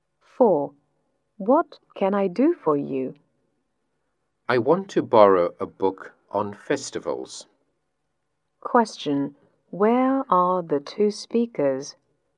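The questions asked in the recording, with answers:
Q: Where are the two speakers?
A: In a library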